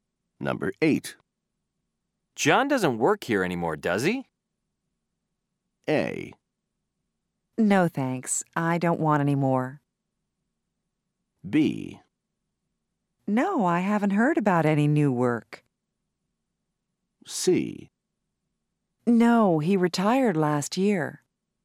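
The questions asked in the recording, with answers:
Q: John doesn't work here anymore, does he?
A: C: No, he retired last year.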